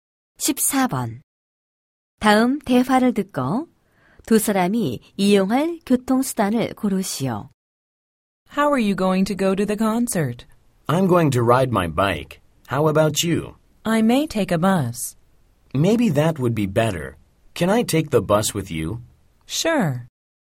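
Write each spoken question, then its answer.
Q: 다음 대화를 듣고 두 사람이 이용할 교통수단을 고르시오.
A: 버스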